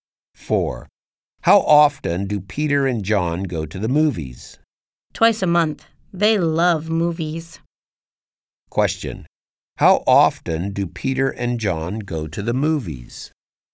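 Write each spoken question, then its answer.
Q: How often do Peter and John go to the movies?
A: Twice a month.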